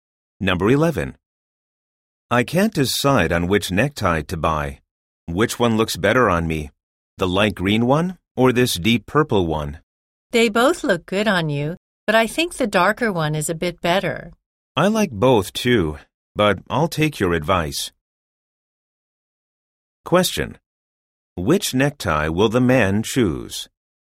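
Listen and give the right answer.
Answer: The deep purple one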